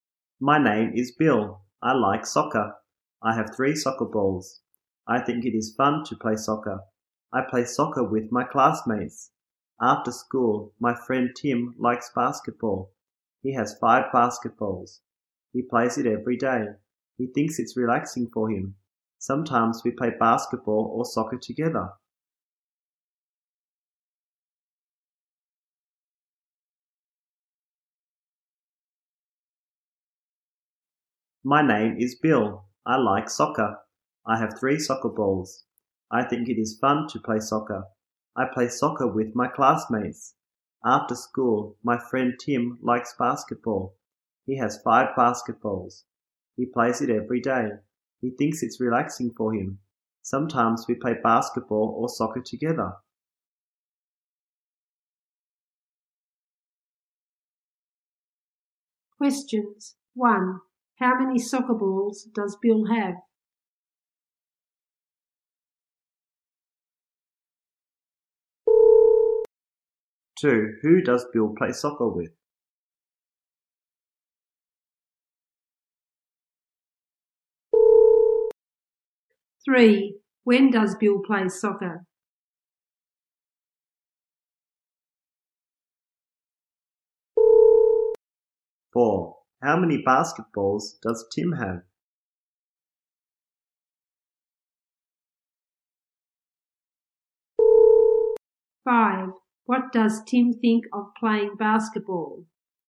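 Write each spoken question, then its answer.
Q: How many soccer balls does Bill have?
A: Three

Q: Who does Bill play soccer with?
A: His classmates

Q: How many basketballs does Tim have?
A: Five

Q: What does Tim think of playing basketball?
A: Relaxing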